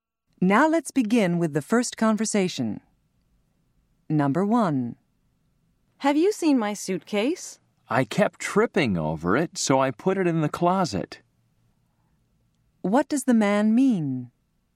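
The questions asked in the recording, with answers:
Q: What does the man mean?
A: He put her suitcase in the closet because he kept tripping over it.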